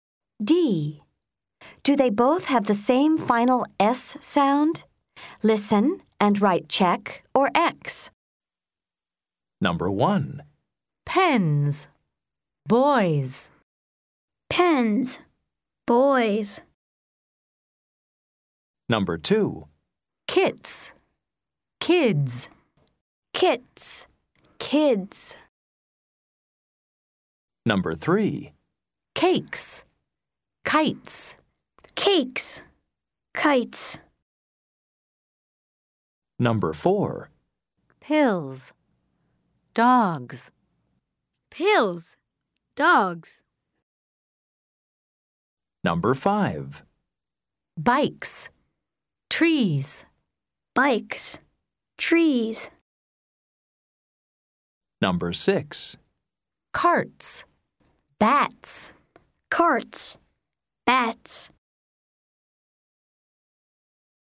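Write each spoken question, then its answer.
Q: Pens. Boys.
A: Yes, same (check)

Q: Kits. Kids.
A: No, different (X)

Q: Cakes. Kites.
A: Yes, same (check)

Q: Pills. Dogs.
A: Yes, same (check)

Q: Bikes. Trees.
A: No, different (X)

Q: Carts. Bats.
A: Yes, same (check)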